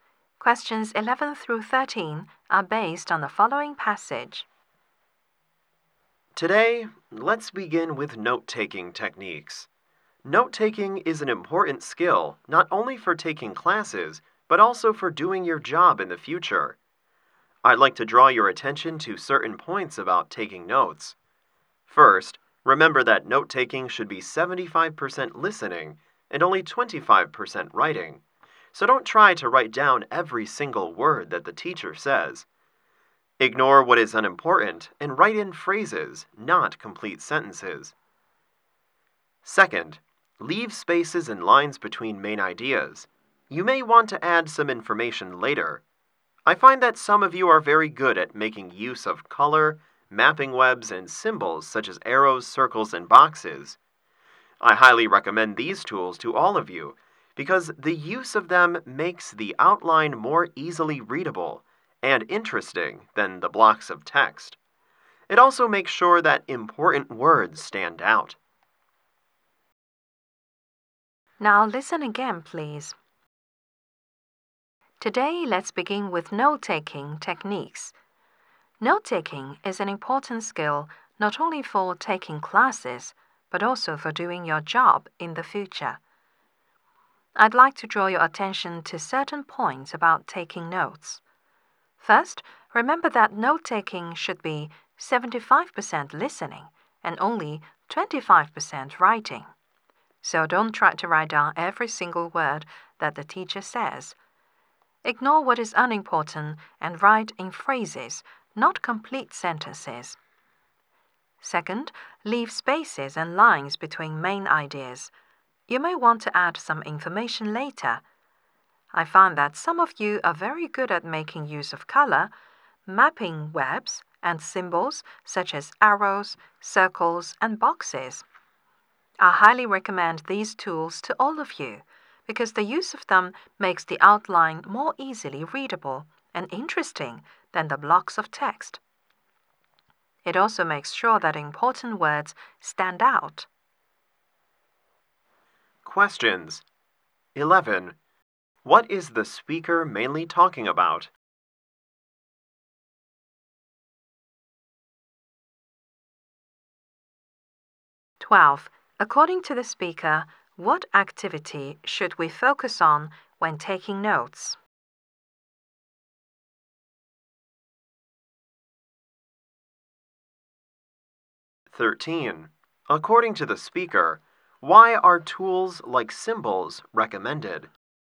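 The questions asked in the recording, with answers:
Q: What is the speaker mainly talking about?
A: Note-taking techniques

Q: According to the speaker, what activity should we focus on when taking notes?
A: Listening

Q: According to the speaker, why are tools like symbols recommended?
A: They make notes more readable and interesting and make important words stand out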